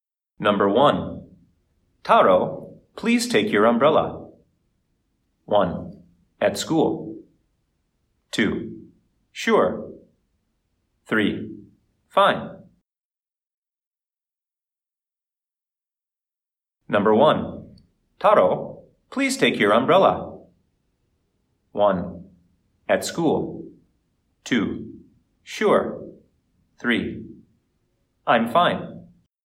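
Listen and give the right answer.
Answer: 2: Sure.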